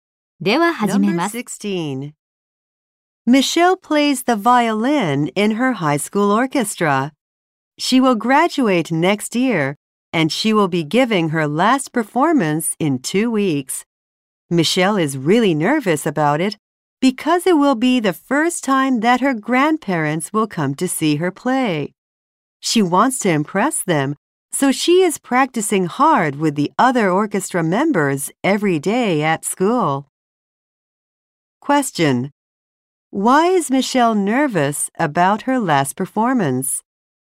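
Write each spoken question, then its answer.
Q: Why is Michelle nervous about her last performance?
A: Her grandparents will see her play for the first time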